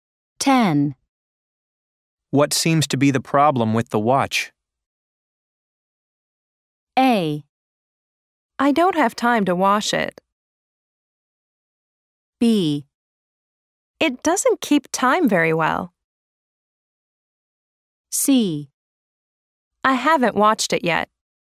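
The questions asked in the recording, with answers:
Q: What seems to be the problem with the watch?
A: B: It doesn't keep time very well.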